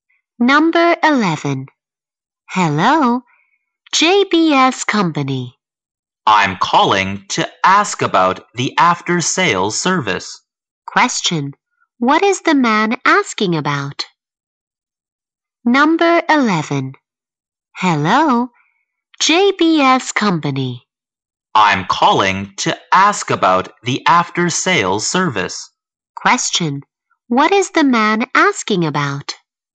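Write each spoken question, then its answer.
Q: What is the man asking about?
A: The after-sales service.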